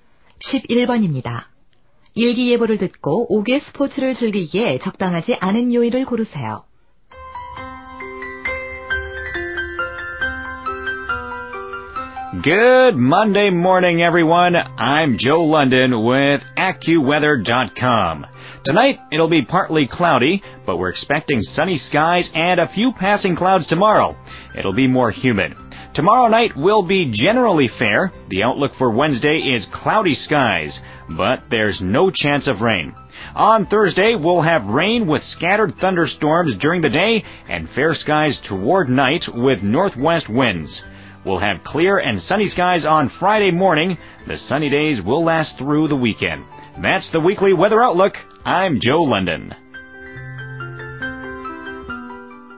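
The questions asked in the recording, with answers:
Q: 일기예보를 듣고 옥외 스포츠를 즐기기에 적당하지 않은 요일을 고르세요.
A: 목요일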